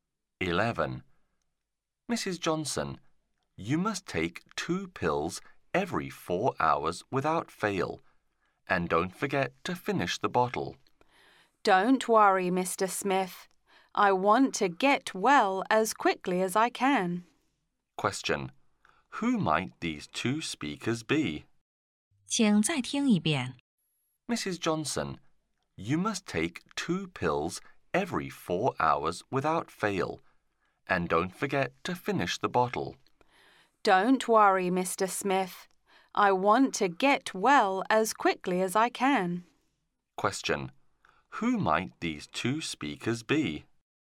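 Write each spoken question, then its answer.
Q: Who might these 2 speakers be?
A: A doctor and a patient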